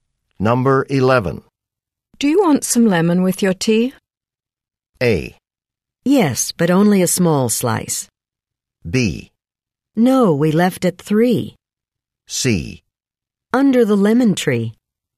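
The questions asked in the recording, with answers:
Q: Do you want some lemon with your tea?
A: A: Yes, but only a small slice.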